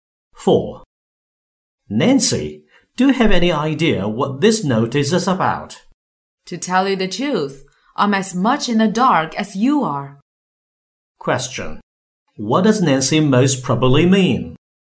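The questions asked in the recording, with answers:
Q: What does Nancy most probably mean?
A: She doesn't know what the notice is about either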